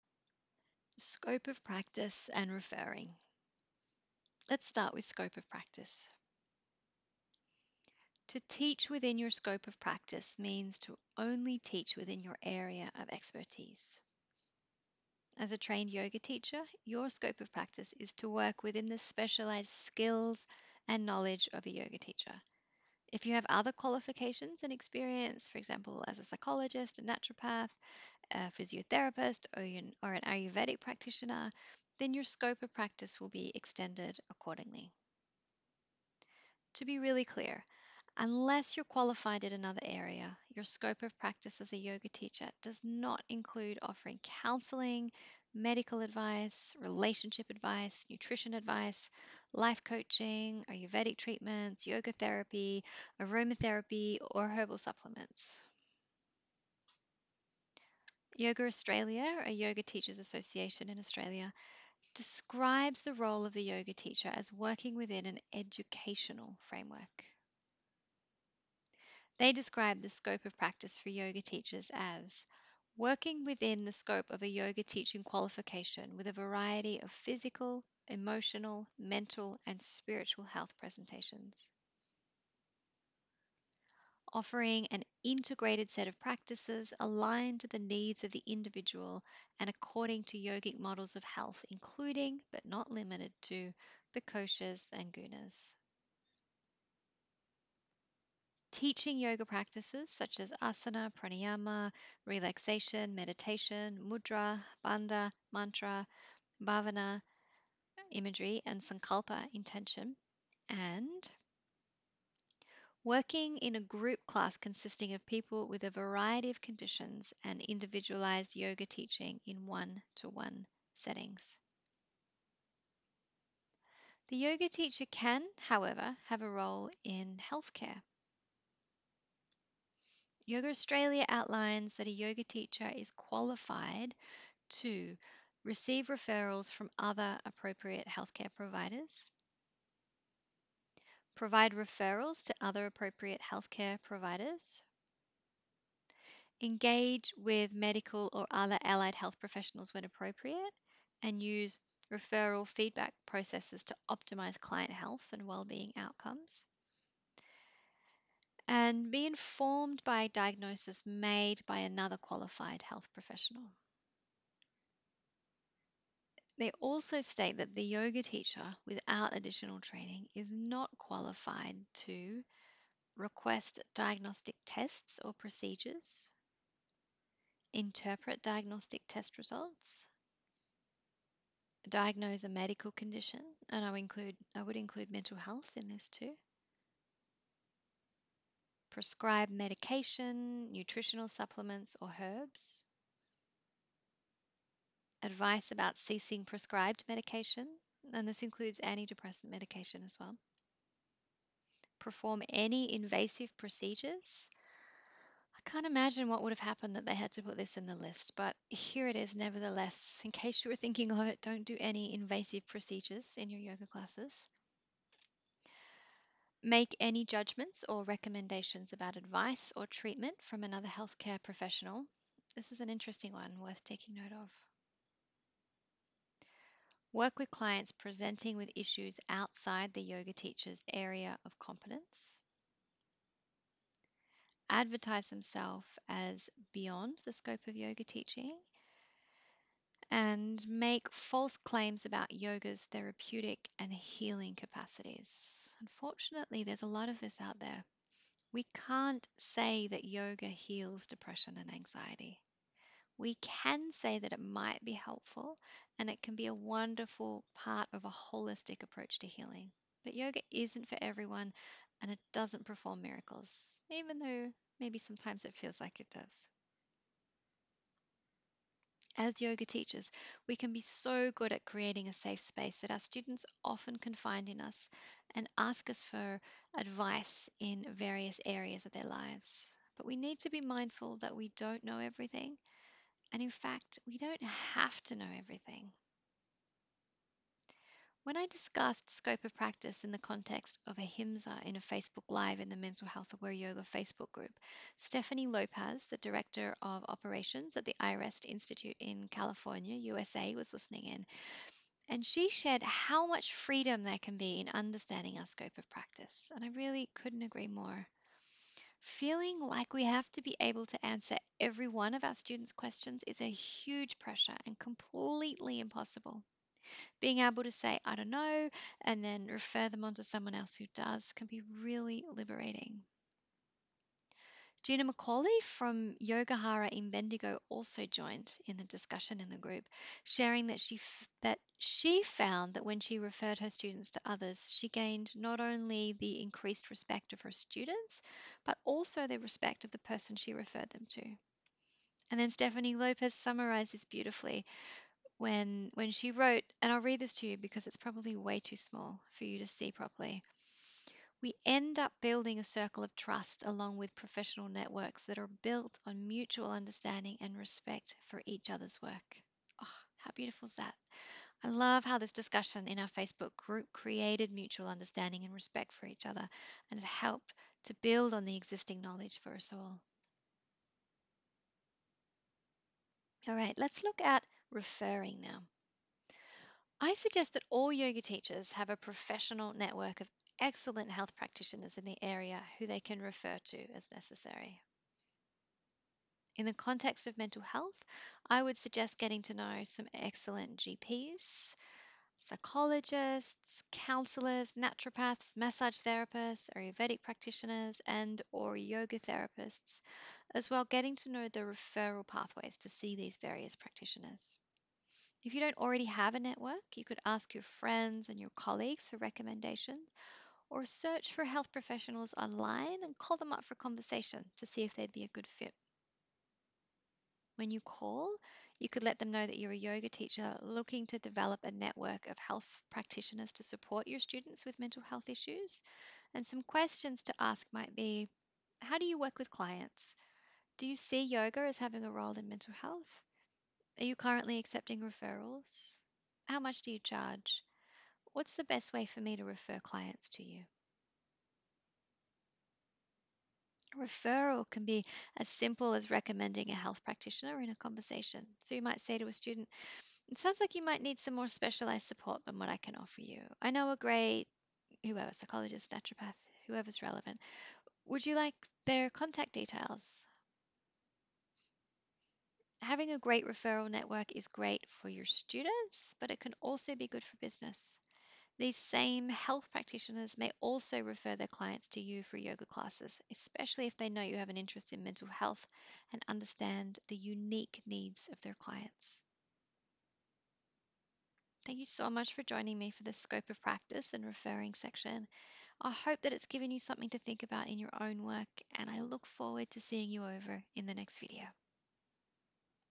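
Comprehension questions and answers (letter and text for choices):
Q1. The scope of practice of a Yoga Teacher (who is not qualified in another area) is to:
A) Teach yoga.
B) Offer counselling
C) Offer nutrition and supplement advice.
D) All of the above.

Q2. According to Yoga Australia, the role of the Yoga Teacher is to work within what framework?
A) Psychodynamic.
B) Educational.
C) Energy healing.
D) None of the above.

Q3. If a student tells you that a Psychologist has given them a diagnosis of depression, what might be an appropriate response?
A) Thank them for letting you know, and ask if there's anything you could do to support them during the class.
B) Ask them to take a depression questionnaire in class, so you can diagnose them yourself.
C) Tell them that you don't believe that the Psychologist really knows they are talking about, and they look fine to you.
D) All of the above.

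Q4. If a student lets you know that they have been taking anti-depressant medication and have been finding it helpful, what might be an appropriate response?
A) Advise them that they should stop taking their anti-depressant medication, as yoga is a cure for depression.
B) Tell them about a herbal supplement you have heard of that is better than pharmaceutical medication.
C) Sell them some essential oils that could be used instead of anti-depressant medication.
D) None of the above.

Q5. Why might having a great referral network be a good idea?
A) It can be helpful to connect your students with great practitioners who can offer them support outside your scope of practice.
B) It can support you to stay within your scope of practice.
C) It can be good for business.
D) All of the above.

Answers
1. A) Teach yoga.
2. B) Educational.
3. A) Thank them for letting you know, and ask if there's anything you could do to support them during the class.
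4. D) None of the above.
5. D) All of the above.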